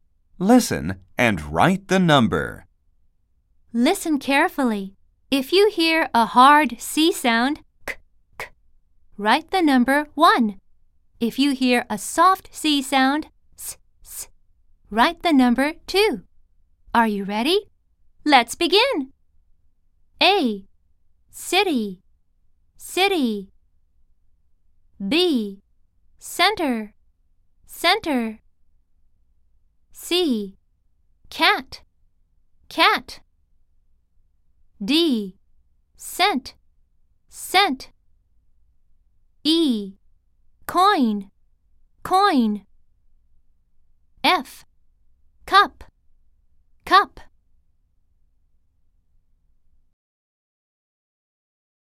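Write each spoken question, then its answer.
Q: City, city.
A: 2 (soft C)

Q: Center, center.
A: 2 (soft C)

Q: Cat, cat.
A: 1 (hard C)

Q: Cent, cent.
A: 2 (soft C)

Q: Coin, coin.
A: 1 (hard C)

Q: Cup, cup.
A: 1 (hard C)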